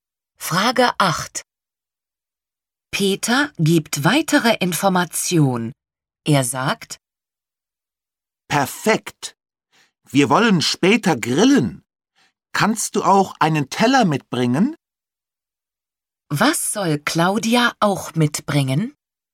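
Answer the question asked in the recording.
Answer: Einen Teller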